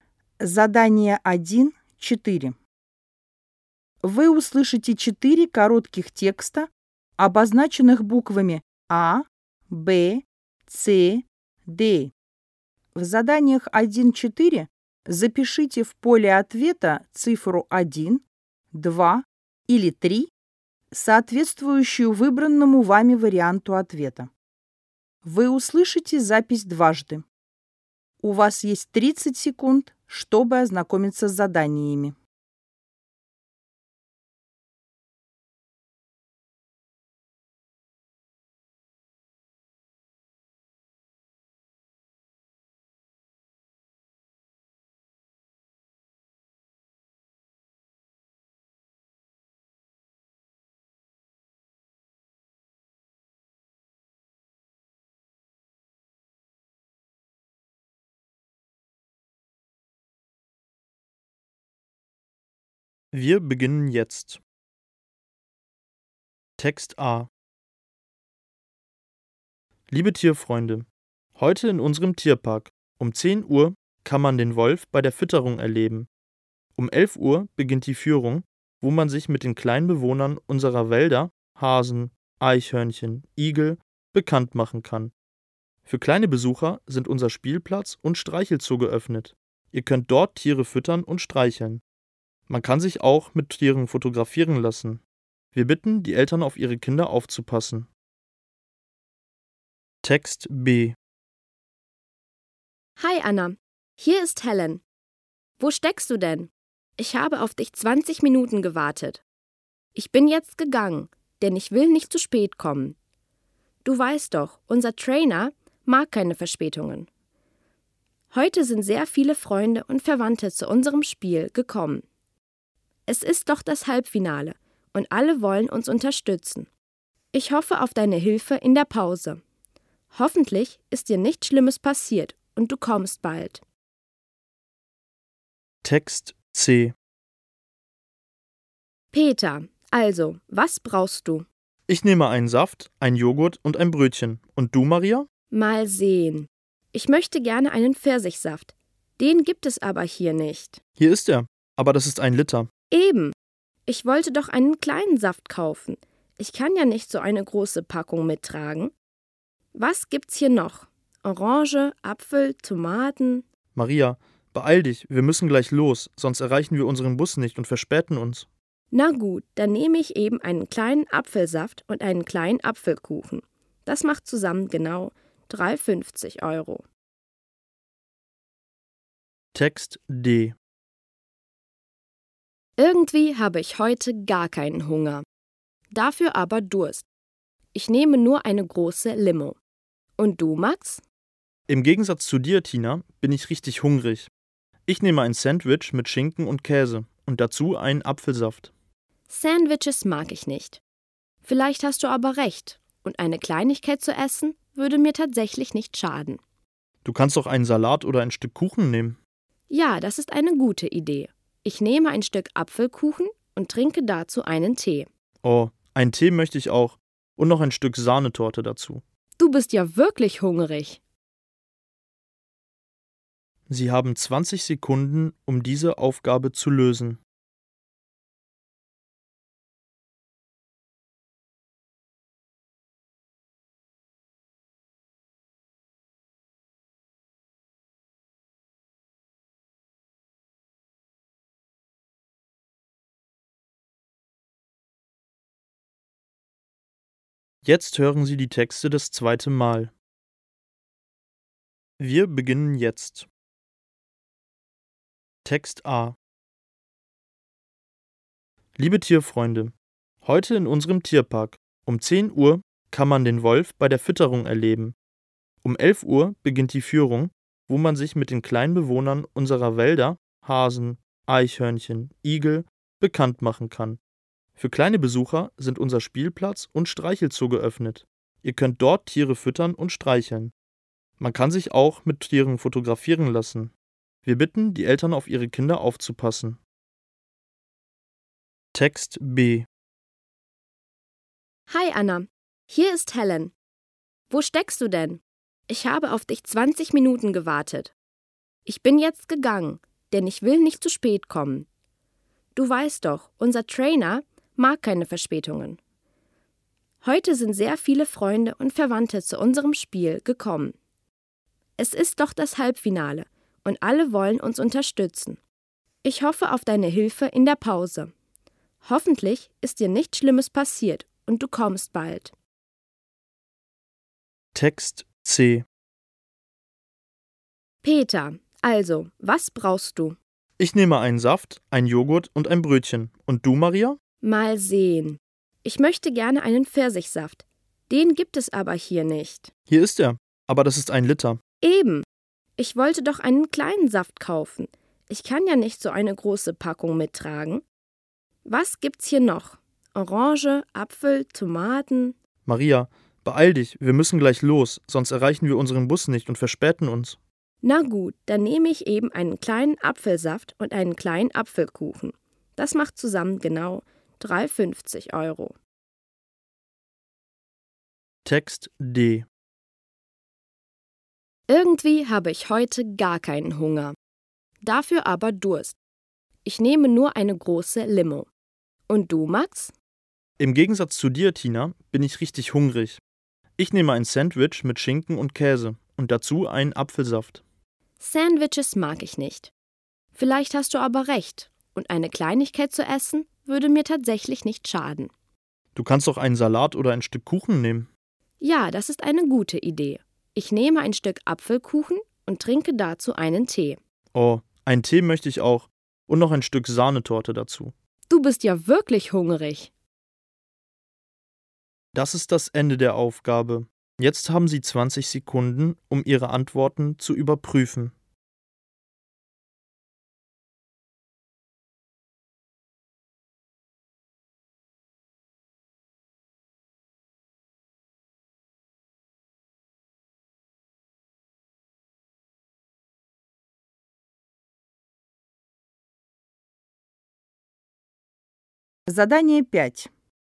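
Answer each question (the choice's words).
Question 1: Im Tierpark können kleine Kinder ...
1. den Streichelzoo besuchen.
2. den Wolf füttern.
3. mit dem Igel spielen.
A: den Streichelzoo besuchen.

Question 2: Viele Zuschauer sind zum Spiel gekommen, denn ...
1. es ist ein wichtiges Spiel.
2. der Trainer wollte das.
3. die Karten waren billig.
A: es ist ein wichtiges Spiel.

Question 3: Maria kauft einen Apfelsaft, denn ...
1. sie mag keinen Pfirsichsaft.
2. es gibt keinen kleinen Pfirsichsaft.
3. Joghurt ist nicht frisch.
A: es gibt keinen kleinen Pfirsichsaft.

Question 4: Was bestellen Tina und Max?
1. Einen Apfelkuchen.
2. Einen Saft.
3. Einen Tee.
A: Einen Tee.

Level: ОГЭ 2026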